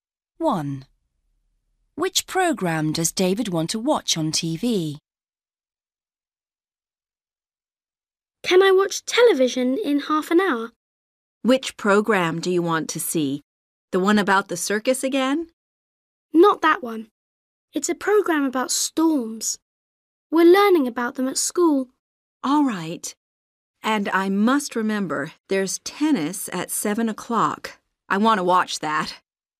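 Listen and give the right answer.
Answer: a program about storms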